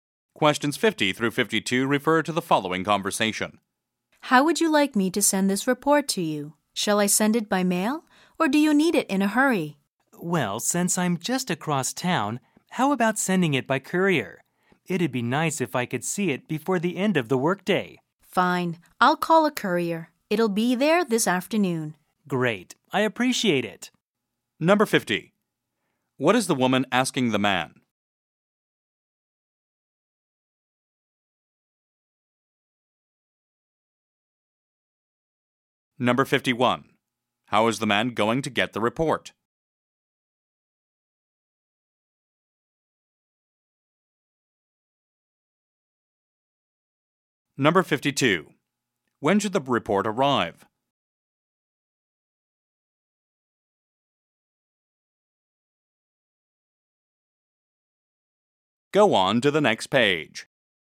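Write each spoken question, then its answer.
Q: How is the man going to get the report?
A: By courier

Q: When should the report arrive?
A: This afternoon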